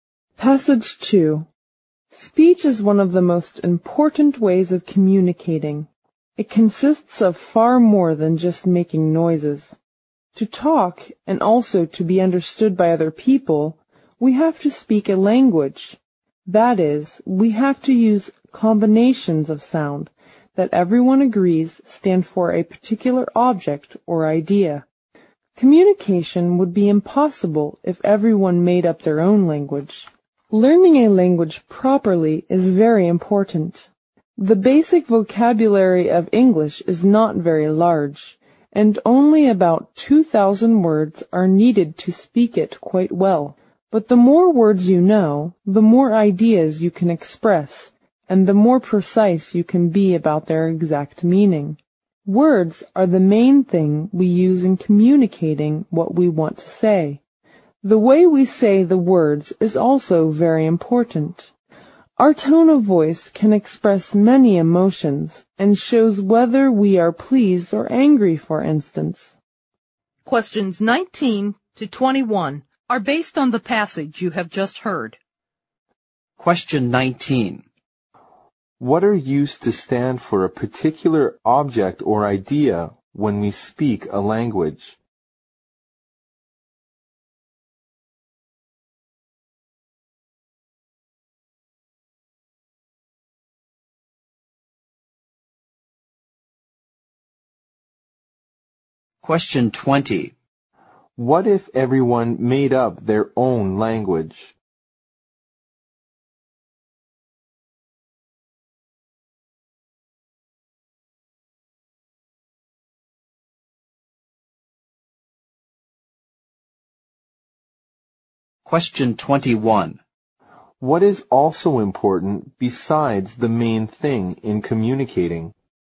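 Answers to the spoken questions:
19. Combinations of sounds
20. Communication would be impossible
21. The way we say the words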